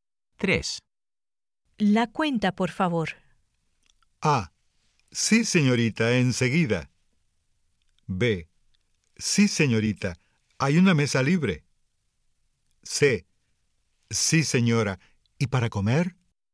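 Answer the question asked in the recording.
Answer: A: Sí, señorita, enseguida.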